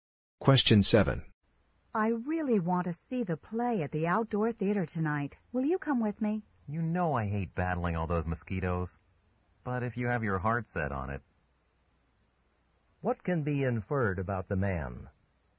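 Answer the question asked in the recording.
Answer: He'll probably go to the play with her even though he hates the mosquitoes.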